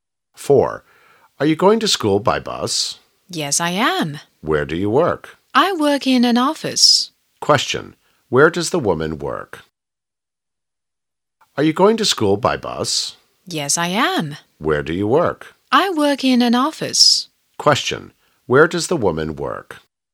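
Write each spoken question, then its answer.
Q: Where does the woman work?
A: In an office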